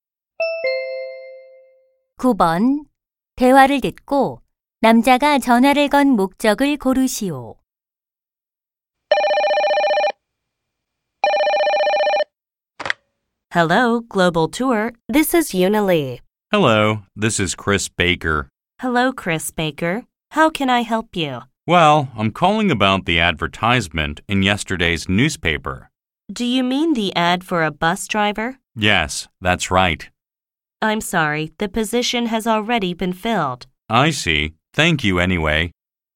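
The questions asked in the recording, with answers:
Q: 대화를 듣고 남자가 전화를 건 목적을 고르시오.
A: 버스 기사 구인 광고에 대해 문의하려고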